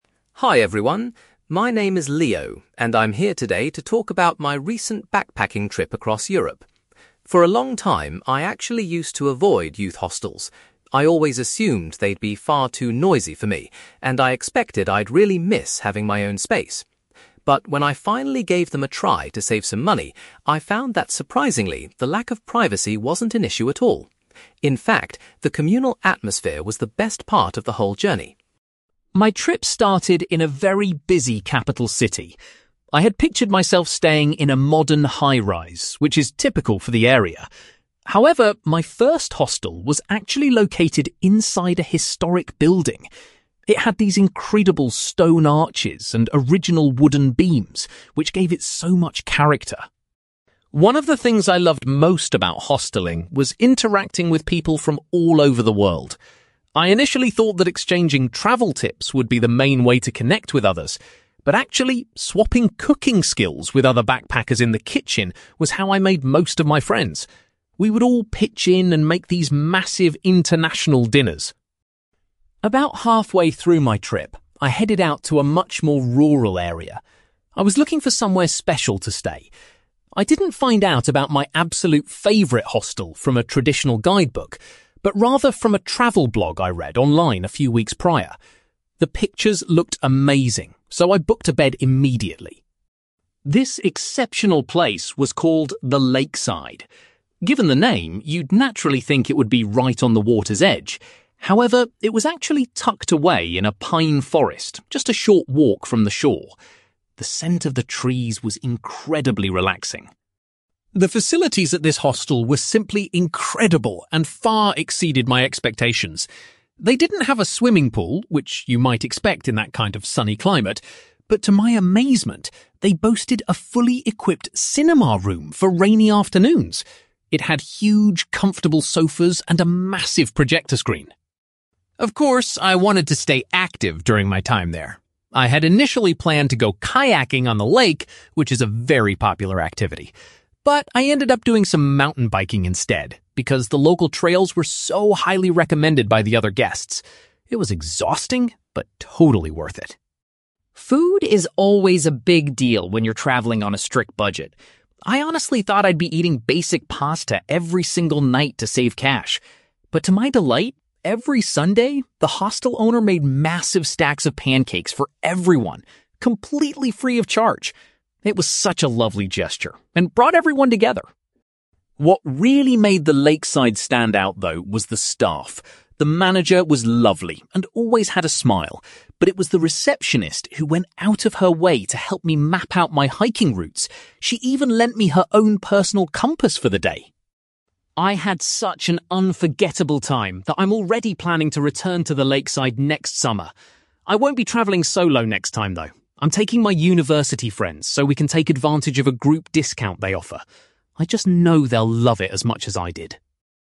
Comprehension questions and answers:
You will hear a young man called Leo talking about his backpacking trip and his experiences staying in hostels. For questions 9-18, complete the sentences with a word or short phrase.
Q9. Leo was surprised that he didn't mind the loss of (9)........................... when staying in youth hostels.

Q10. During his stay in the capital, Leo's accommodation was situated in a (10)........................... .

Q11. Leo found that sharing (11)........................... in the communal kitchen was a great way to meet fellow travellers.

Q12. Leo discovered The Lakeside hostel by reading a (12)........................... on the internet.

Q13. The Lakeside hostel was surprisingly situated in the middle of a (13)........................... rather than right next to the water.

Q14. Leo was amazed to discover that the hostel featured a (14)........................... for guests to use when the weather was bad.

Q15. Because of the excellent local trails, Leo decided to try (15)........................... during his stay.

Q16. Leo was thrilled that complimentary (16)........................... were provided by the owner once a week.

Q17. Leo was particularly grateful to the (17)........................... for assisting him with his walking itinerary.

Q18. For his next visit, Leo intends to claim a (18)........................... by bringing his friends along.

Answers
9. privacy
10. historic building
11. cooking skills
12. travel blog
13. pine forest
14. cinema room
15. mountain biking
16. pancakes
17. receptionist
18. group discount

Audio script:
Leo: Hi everyone. My name is Leo, and I'm here today to talk about my recent backpacking trip across Europe. For a long time, I actually used to avoid youth hostels. I always assumed they'd be far too noisy for me, and I expected I'd really miss having my own space. But, when I finally gave them a try to save some money, I found that surprisingly, the lack of privacy wasn't an issue at all. In fact, the communal atmosphere was the best part of the whole journey.
My trip started in a very busy capital city. I had pictured myself staying in a modern high-rise, which is typical for the area. However, my first hostel was actually located inside a historic building. It had these incredible stone arches and original wooden beams, which gave it so much character.
One of the things I loved most about hosteling was interacting with people from all over the world. I initially thought that exchanging travel tips would be the main way to connect with others. But actually, swapping cooking skills with other backpackers in the kitchen was how I made most of my friends. We would all pitch in and make these massive international dinners.
About halfway through my trip, I headed out to a much more rural area. I was looking for somewhere special to stay. I didn't find out about my absolute favourite hostel from a traditional guidebook, but rather from a travel blog I read online a few weeks prior. The pictures looked amazing, so I booked a bed immediately.
This exceptional place was called The Lakeside. Given the name, you'd naturally think it would be right on the water's edge. However, it was actually tucked away in a pine forest just a short walk from the shore. The scent of the trees was incredibly relaxing.
The facilities at this hostel were simply incredible and far exceeded my expectations. They didn't have a swimming pool, which you might expect in that kind of sunny climate, but to my amazement, they boasted a fully equipped cinema room for rainy afternoons. It had huge, comfortable sofas and a massive projector screen.
Of course, I wanted to stay active during my time there. I had initially planned to go kayaking on the lake, which is a very popular activity. But, I ended up doing some mountain biking instead because the local trails were so highly recommended by the other guests. It was exhausting but totally worth it.
Food is always a big deal when you're travelling on a strict budget. I honestly thought I'd be eating basic pasta every single night to save cash. But to my delight, every Sunday, the hostel owner made massive stacks of pancakes for everyone, completely free of charge! It was such a lovely gesture and brought everyone together.
What really made The Lakeside stand out, though, was the staff. The manager was lovely and always had a smile, but it was the receptionist who went out of her way to help me map out my hiking routes. She even lent me her own personal compass for the day.
I had such an unforgettable time that I'm already planning to return to The Lakeside next summer. I won't be travelling solo next time, though. I'm taking my university friends so we can take advantage of a group discount they offer. I just know they'll love it as much as I did.

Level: B2